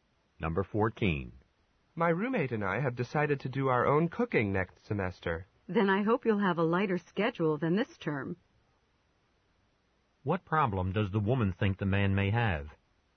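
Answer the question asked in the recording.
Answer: He may not have enough time to cook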